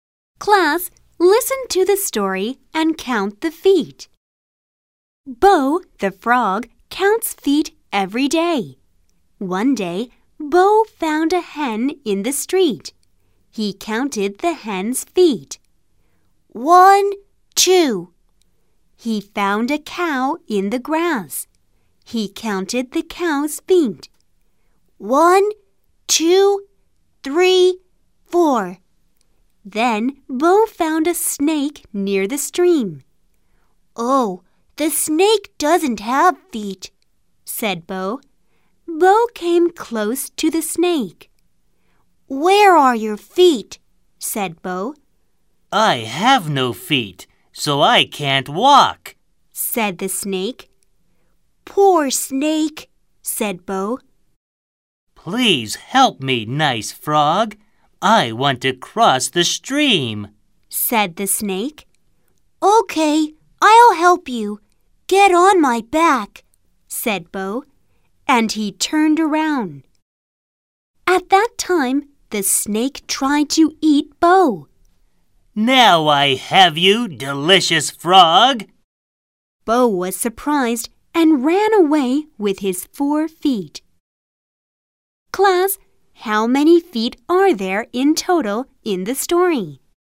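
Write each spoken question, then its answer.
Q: Class, how many feet are there in total in the story?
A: 10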